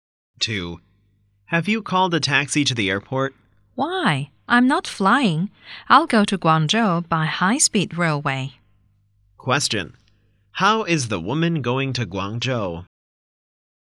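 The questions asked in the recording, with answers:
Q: How is the woman going to Guangzhou?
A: By high-speed railway.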